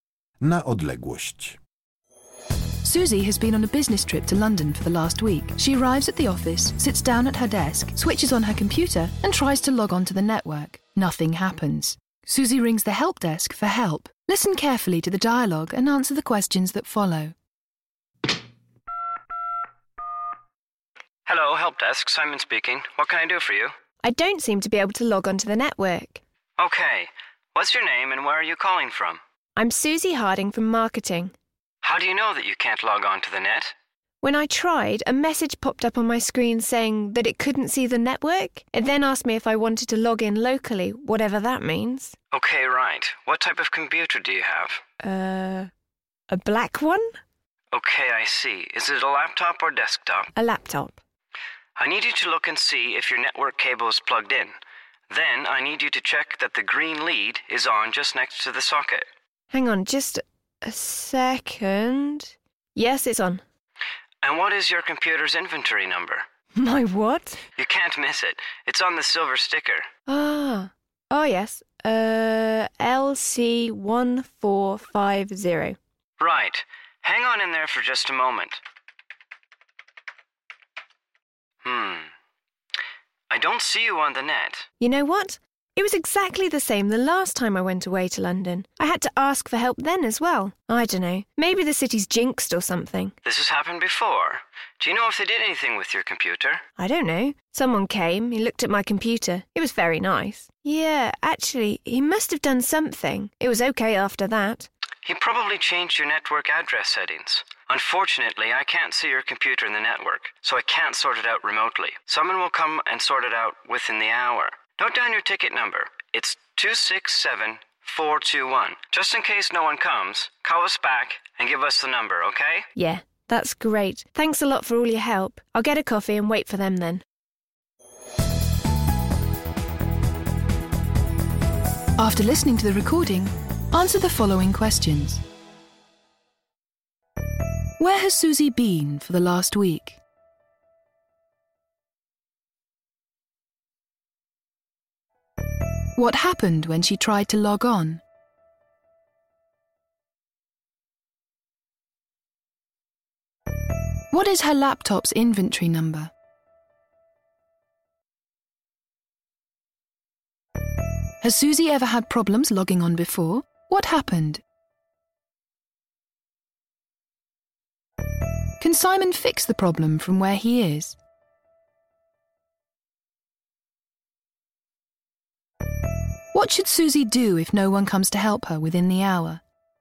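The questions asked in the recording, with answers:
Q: Where has Susie been for the last week?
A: On a business trip to London

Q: What happened when she tried to log on?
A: A message said the computer couldn't see the network and asked whether to log in locally

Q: What is her laptop's inventory number?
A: LC1450

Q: Has Susie ever had problems logging on before?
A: Yes, the last time she went to London

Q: What happened?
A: Someone came and looked at her computer, probably changed the network address settings, and then it was okay

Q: Can Simon fix the problem from where he is?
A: No, he can't see her computer on the network, so he can't fix it remotely

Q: What should Susie do if no one comes to help her within the hour?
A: Call the help desk back and give them the ticket number, 267-421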